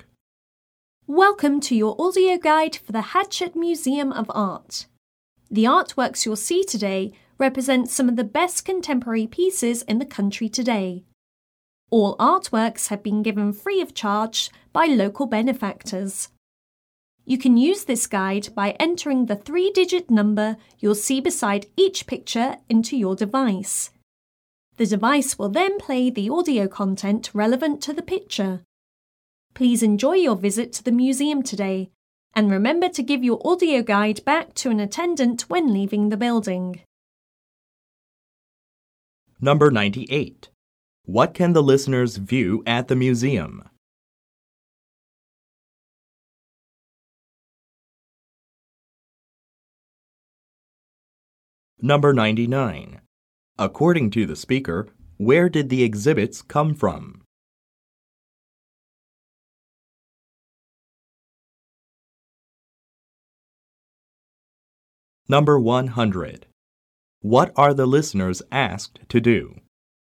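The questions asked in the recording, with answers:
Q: What can the listeners view at the museum?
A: Contemporary artworks

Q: According to the speaker, where did the exhibits come from?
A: They were given free of charge by local benefactors

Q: What are the listeners asked to do?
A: Give their audio guide back to an attendant when leaving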